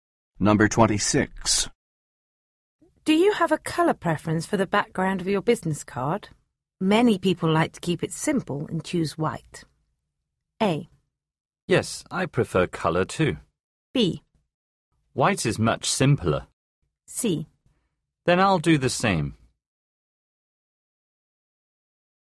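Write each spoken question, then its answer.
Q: Do you have a color preference for the background of your business card?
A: C: Then I'll do the same.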